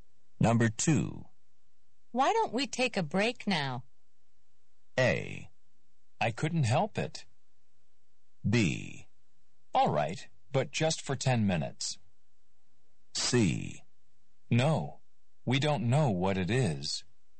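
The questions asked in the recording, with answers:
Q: Why don't we take a break now?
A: B: All right, but just for 10 minutes.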